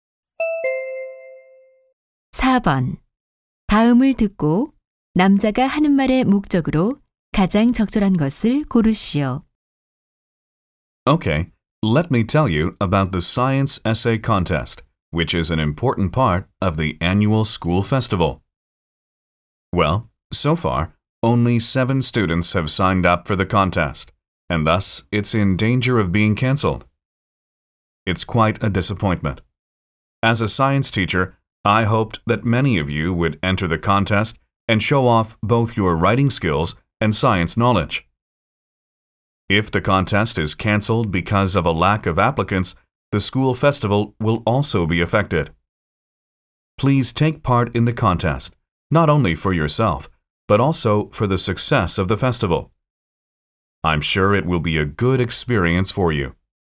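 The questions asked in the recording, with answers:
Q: 다음을 듣고 남자가 하는 말의 목적으로 가장 적절한 것을 고르시오.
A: 과학 에세이 대회 참가를 독려하려고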